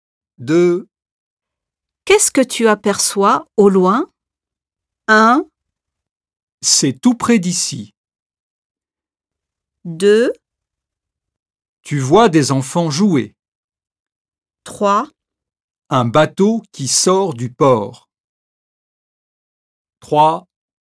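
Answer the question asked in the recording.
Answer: 3: Un bateau qui sort du port.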